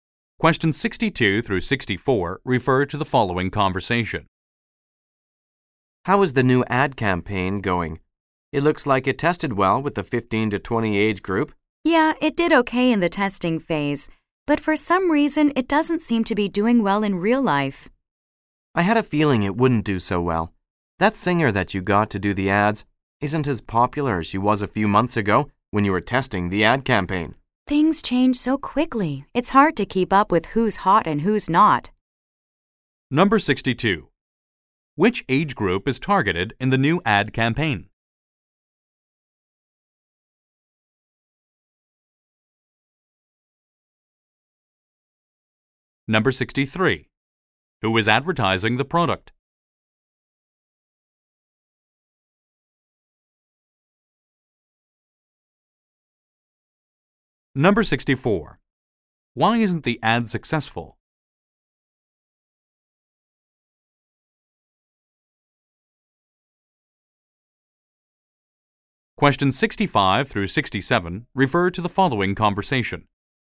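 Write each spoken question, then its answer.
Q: Which age group is targeted in the new ad campaign?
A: 15 to 20

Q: Who is advertising the product?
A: A singer

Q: Why isn't the ad successful?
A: The singer isn't as popular as she was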